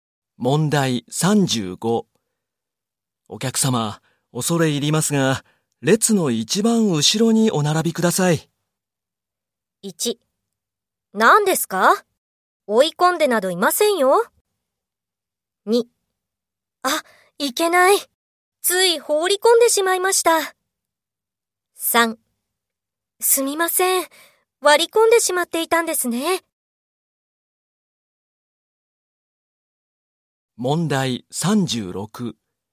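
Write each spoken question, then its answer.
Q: お客様、恐れ入りますが、列の一番後ろにお並びください。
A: 3: すみません。割り込んでしまっていたんですね。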